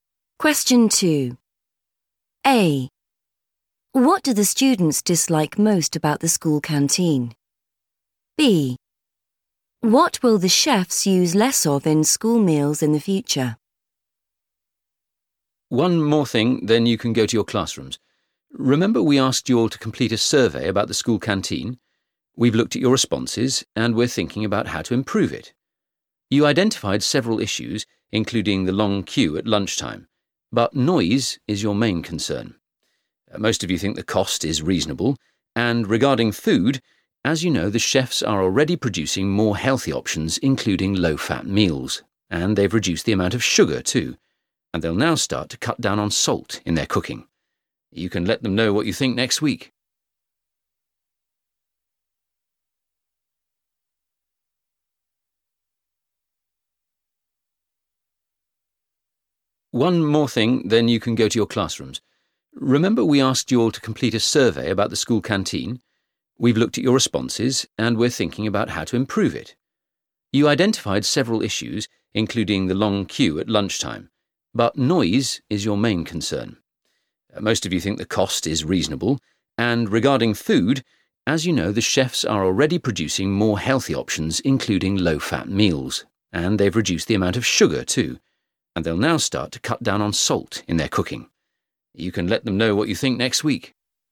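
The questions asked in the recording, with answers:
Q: What do the students dislike most about the school canteen?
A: noise

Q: What will the chefs use less of in school meals in the future?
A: salt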